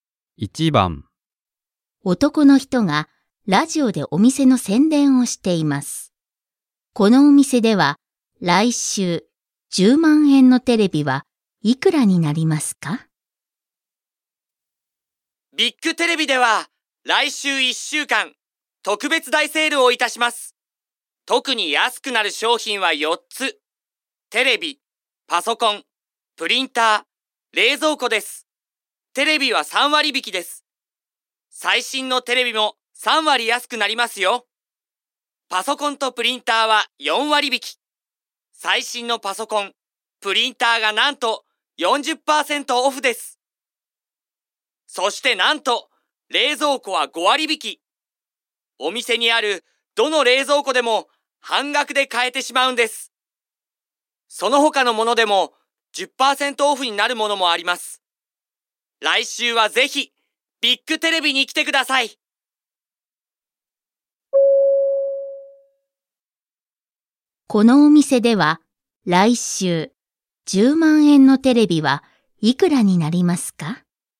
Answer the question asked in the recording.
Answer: 2番です。Choice 2, 7万円, 70,000 yen.